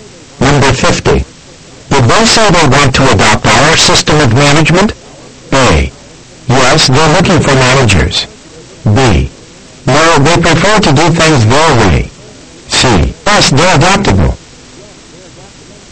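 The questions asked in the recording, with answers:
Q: Did they say they want to adopt our system of management?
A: B: No, they prefer to do things their way.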